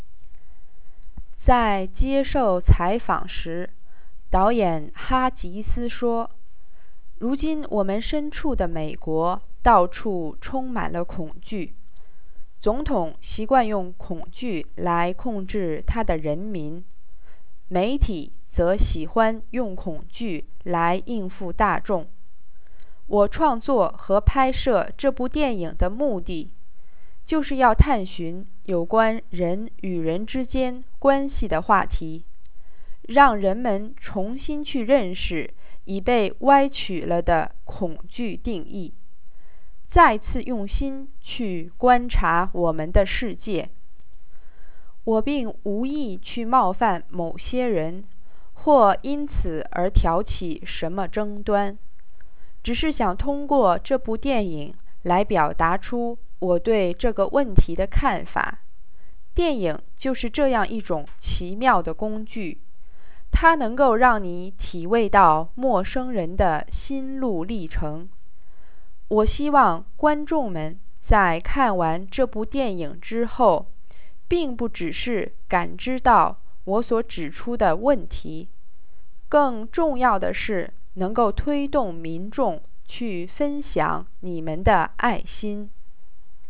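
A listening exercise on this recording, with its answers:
Please answer the following questions in English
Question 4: 哈吉斯拍这部电影的目的是什么?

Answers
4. To explore relationships between people, help people re-understand the distorted idea of fear and look at the world again with their hearts, and encourage audiences to share their love.

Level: 3rd Year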